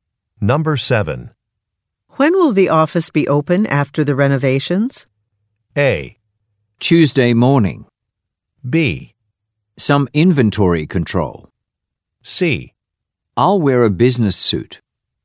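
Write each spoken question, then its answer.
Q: When will the office be open after the renovations?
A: A: Tuesday morning.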